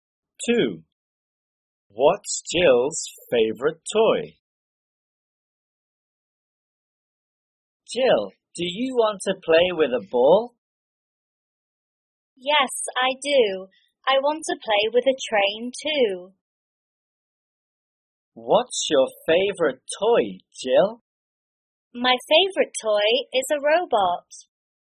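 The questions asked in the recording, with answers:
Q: What's Jill's favorite toy?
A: a robot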